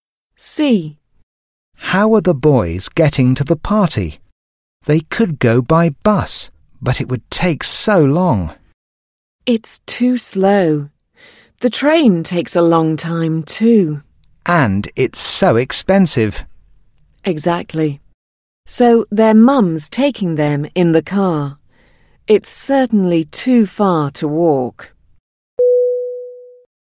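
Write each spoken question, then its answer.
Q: How are the boys getting to the party?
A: By car (their mum's taking them)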